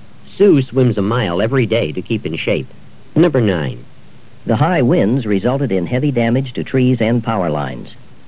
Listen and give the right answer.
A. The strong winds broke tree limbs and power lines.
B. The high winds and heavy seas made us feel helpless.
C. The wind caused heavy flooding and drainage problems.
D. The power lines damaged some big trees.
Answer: A. The strong winds broke tree limbs and power lines.

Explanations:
The high winds resulted in heavy damage to trees and power lines.

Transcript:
8. Sue swims a mile every day to keep in shape.
9. The high winds resulted in heavy damage to trees and power lines.